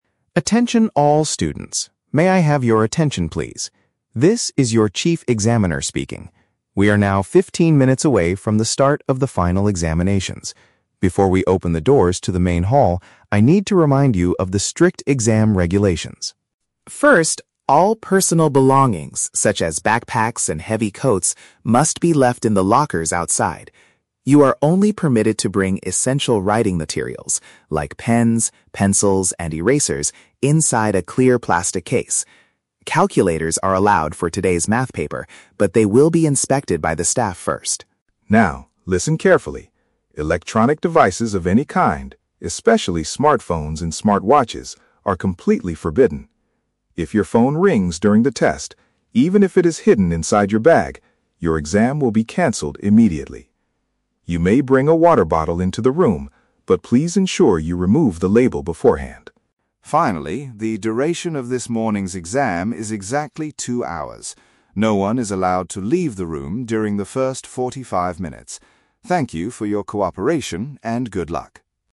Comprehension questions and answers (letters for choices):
Listen to an announcement made by an examiner and choose the correct answer (A, B, or C) for each question.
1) What are students allowed to bring to their desks?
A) A plastic water bottle with a brand label on it.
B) A transparent bag containing basic writing tools.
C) Their winter jackets and personal backpacks.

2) What will happen if a student's mobile phone makes a sound?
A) Their test results will be invalidated right away.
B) The examiner will confiscate the device until the end.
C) They will be asked to move their bags outside the hall.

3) What is the rule regarding the time limit of the exam?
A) Students must complete the whole test in forty-five minutes.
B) Students have fifteen minutes to review their answers at the end.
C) Students cannot exit the hall at the beginning of the test.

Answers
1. B
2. A
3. C

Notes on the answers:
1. The examiner says students can bring "essential writing materials... inside a clear plastic case". Option B paraphrases "clear plastic case" as "transparent bag" and "essential writing materials" as "basic writing tools". The Trap: Option (A) is a trap. The audio mentions a water bottle, but the examiner strictly says, "remove the label beforehand". Option (C) is what students must leave in the lockers outside, not bring to their desks.
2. The examiner warns that if a phone rings, "your exam will be canceled immediately". Option A paraphrases "canceled immediately" as "invalidated right away". The Trap: Option (B) is a plausible action for a teacher to take, but it is not mentioned in the audio. Option (C) mixes the words "bags" and "outside", but moving bags is not the punishment for a ringing phone.
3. The announcement states, "No one is allowed to leave the room during the first forty-five minutes." Option C paraphrases "leave the room during the first forty-five minutes" as "cannot exit the hall at the beginning". The Trap: Option (A) is a trap using the number "forty-five minutes", but the total duration of the exam is two hours, not 45 minutes. Option (B) is a trap using the number "fifteen minutes", which in the audio is the time left before the exam starts, not review time at the end.

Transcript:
Chief Examiner: Attention all students. May I have your attention, please? This is your chief examiner speaking. We are now 15 minutes away from the start of the final examinations. Before we open the doors to the main hall, I need to remind you of the strict exam regulations.
First, all personal belongings, such as backpacks and heavy coats, must be left in the lockers outside. You are only permitted to bring essential writing materials—like pens, pencils, and erasers—inside a clear plastic case. Calculators are allowed for today's math paper, but they will be inspected by the staff first.
Now, listen carefully: electronic devices of any kind, especially smartphones and smartwatches, are completely forbidden. If your phone rings during the test, even if it is hidden inside your bag, your exam will be canceled immediately. You may bring a water bottle into the room, but please ensure you remove the label beforehand.
Finally, the duration of this morning's exam is exactly two hours. No one is allowed to leave the room during the first forty-five minutes. Thank you for your cooperation, and good luck!